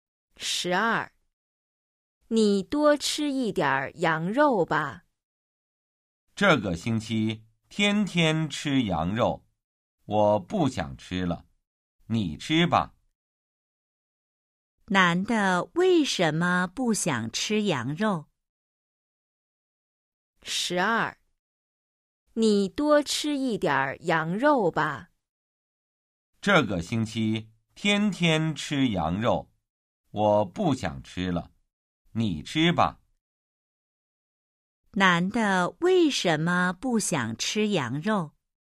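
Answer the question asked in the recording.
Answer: 这个星期天天吃羊肉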